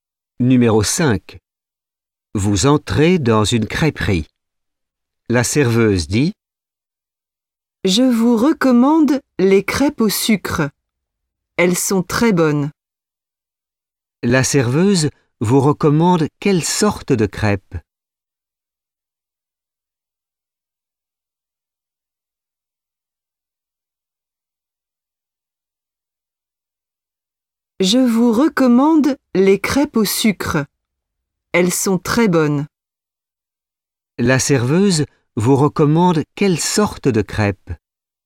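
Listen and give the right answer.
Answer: Les crêpes au sucre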